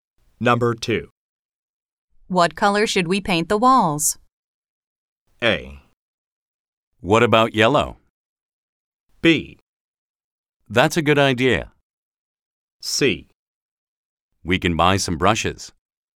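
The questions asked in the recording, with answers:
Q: What color should we paint the walls?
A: A: What about yellow?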